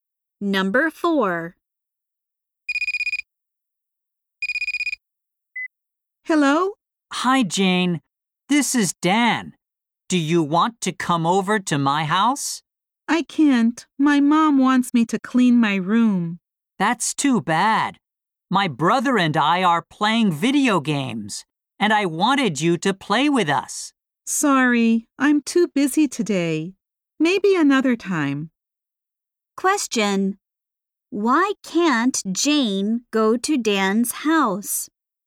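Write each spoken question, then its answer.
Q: Why can't Jane go to Dan's house?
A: Her mom wants her to clean her room.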